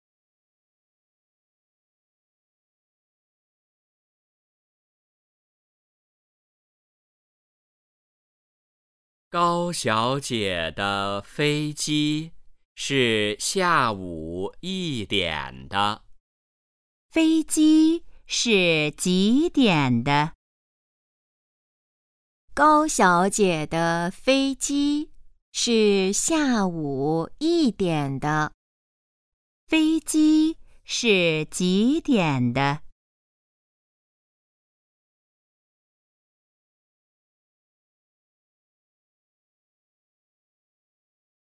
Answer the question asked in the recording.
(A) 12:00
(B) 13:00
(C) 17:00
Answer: (B) 13:00

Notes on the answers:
高小姐的飞机是下午一点的。

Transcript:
高小姐的飞机是下午一点的。
问:飞机是几点的?

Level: 汉语水平考试(HSK)一级